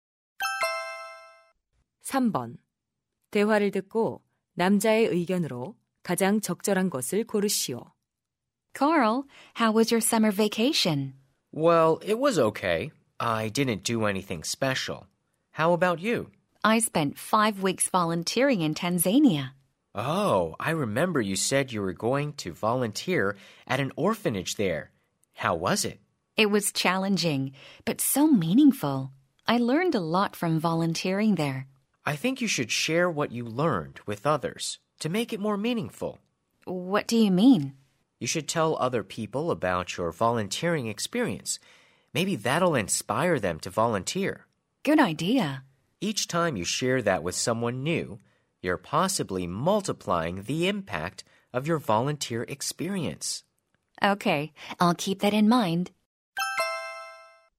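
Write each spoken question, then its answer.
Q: 대화를 듣고 남자의 의견으로 가장 적절한 것을 고르시오.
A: 봉사 경험을 다른 사람들과 공유해야 한다.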